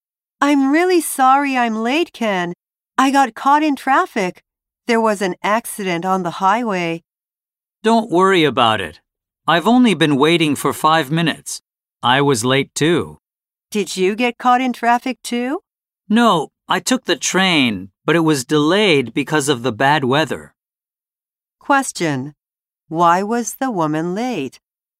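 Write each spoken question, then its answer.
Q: Why was the woman late?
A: She got caught in traffic because of an accident on the highway.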